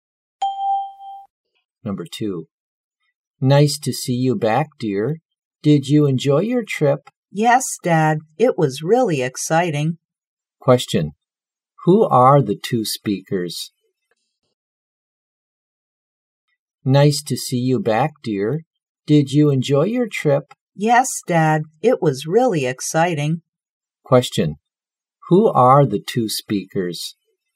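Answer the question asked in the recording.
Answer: A father and his child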